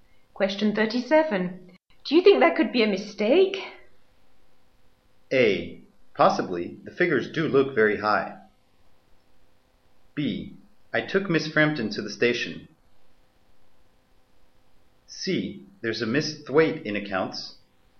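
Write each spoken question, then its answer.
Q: Do you think that could be a mistake?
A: A: Possibly. The figures do look very high.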